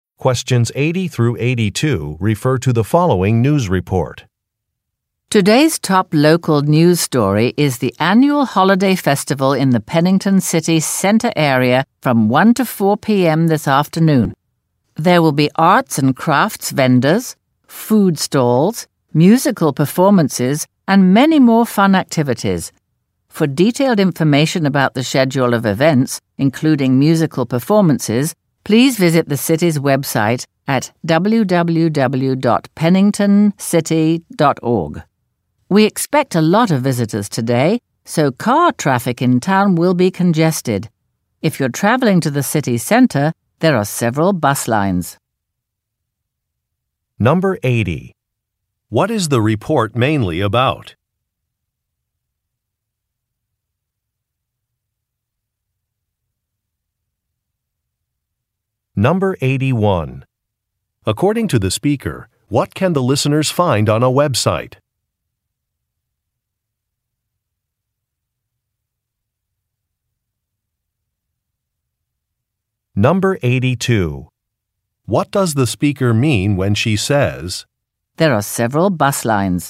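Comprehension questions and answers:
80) What is the report mainly about?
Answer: A city festival

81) According to the speaker, what can the listeners find on a Web site?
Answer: A schedule of events

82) What does the speaker mean when she says, "there are several bus lines"?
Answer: People should take the bus to an event.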